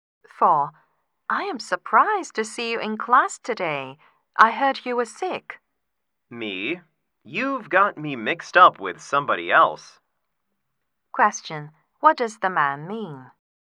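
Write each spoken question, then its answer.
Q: What does the man mean?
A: He wasn't sick; she has confused him with someone else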